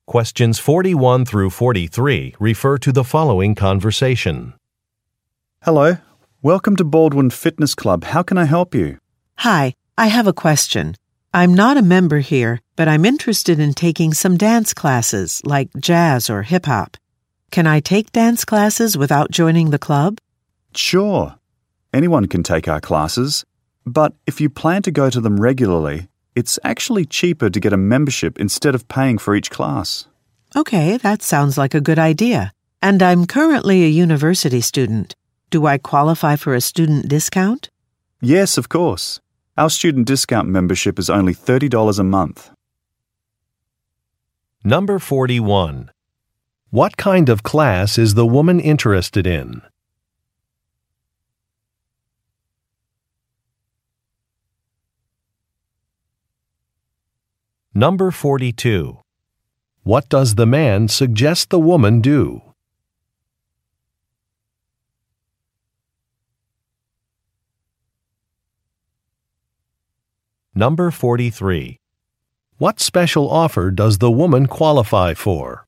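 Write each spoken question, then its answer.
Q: What kind of class is the woman interested in?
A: Dance classes

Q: What does the man suggest the woman do?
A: Get a membership

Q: What special offer does the woman qualify for?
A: A student discount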